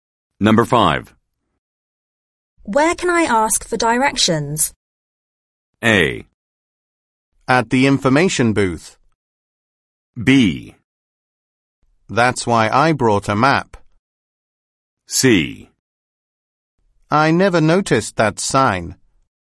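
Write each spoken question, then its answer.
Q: Where can I ask for directions?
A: A: At the information booth.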